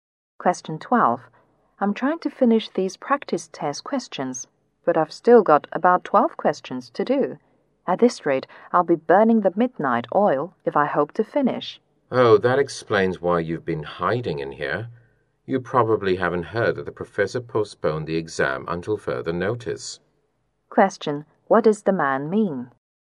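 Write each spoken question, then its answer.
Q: What does the man mean?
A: The woman doesn't need to stay up late because the exam has been postponed.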